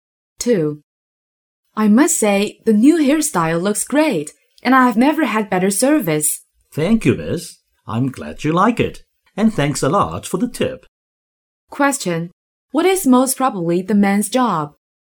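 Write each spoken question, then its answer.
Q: What is most probably the man's job?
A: Hairdresser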